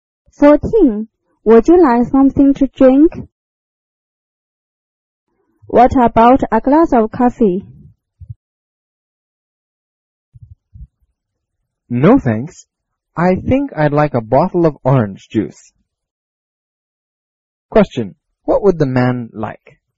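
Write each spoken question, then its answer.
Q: What would the man like?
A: A bottle of orange juice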